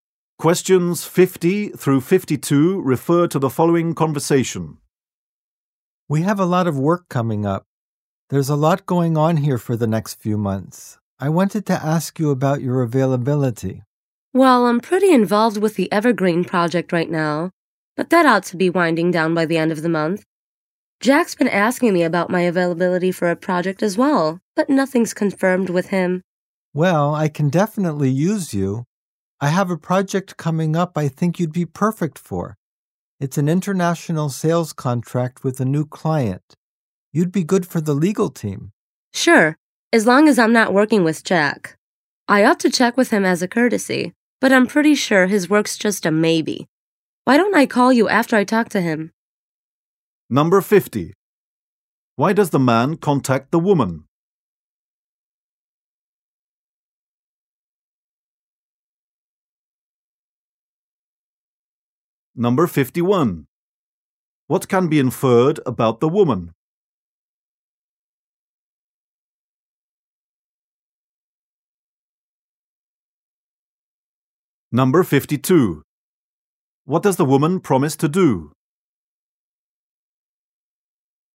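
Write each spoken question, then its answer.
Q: Why does the man contact the woman?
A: To ask about her availability

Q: What does the woman promise to do?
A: Call him after talking to Jack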